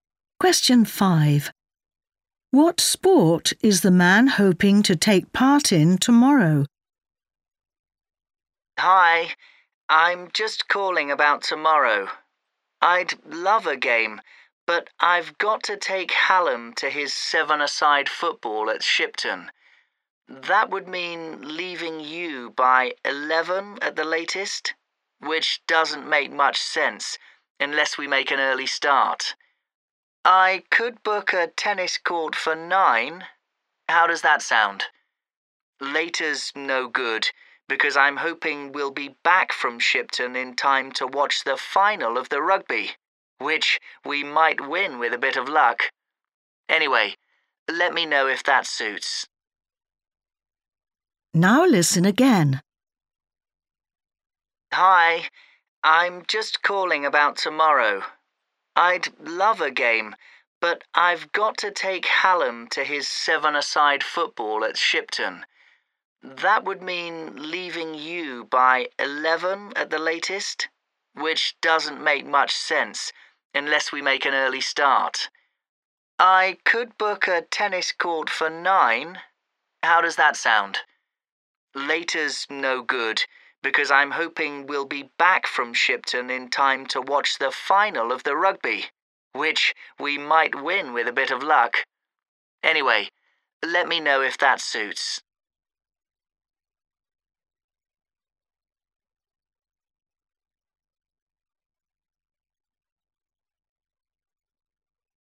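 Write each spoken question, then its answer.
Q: What sport is the man hoping to take part in tomorrow?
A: tennis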